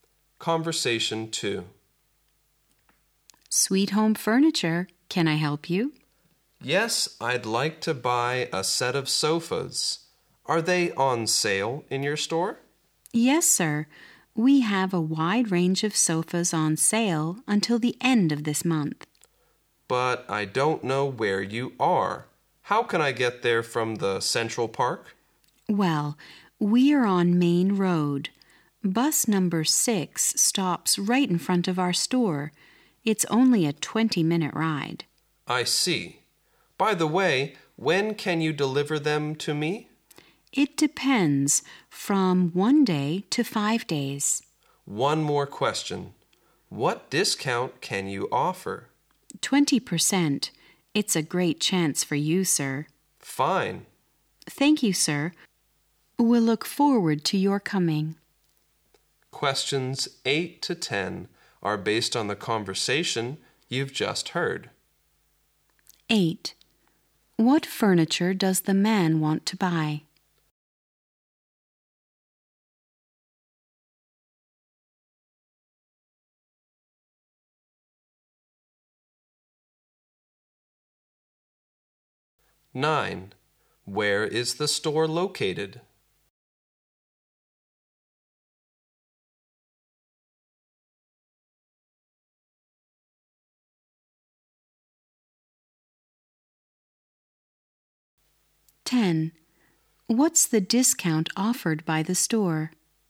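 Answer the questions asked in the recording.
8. A set of sofas
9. On Main Road
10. 20%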